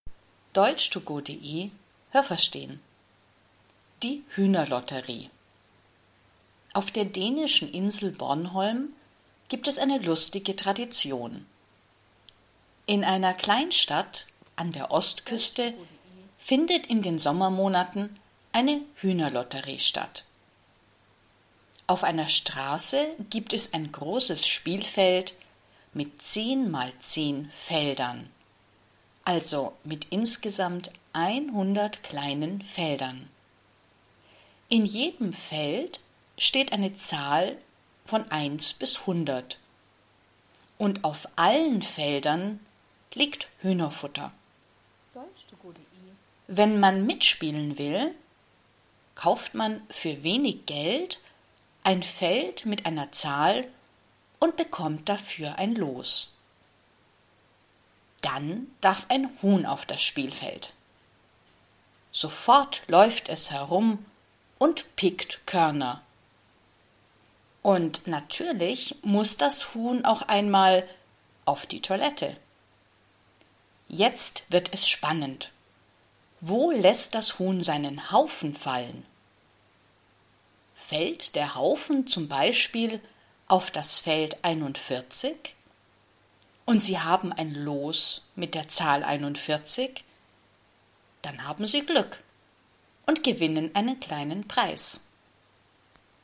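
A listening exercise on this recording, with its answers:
Was haben Sie gehört? Es gibt nur eine korrekte Antwort.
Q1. Die Hühner-Lotterie gibt es in ...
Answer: Dänemark, auf der Insel Bornholm

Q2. Die Hühner-Lotterie findet _____ statt.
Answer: in den Sommermonaten

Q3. Man spielt die Hühner-Lotterie ...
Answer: auf einer Straße

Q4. Das Spielfeld hat _____ kleine Felder.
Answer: 100

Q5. Auf dem Los ist ...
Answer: eine Zahl

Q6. Es wird spannend, wenn das Huhn ...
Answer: auf die Toilette muss

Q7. Welches Los gewinnt? Das Feld, wo das Huhn ...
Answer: seinen Haufen fallen lässt

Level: Hörtexte A (einfach)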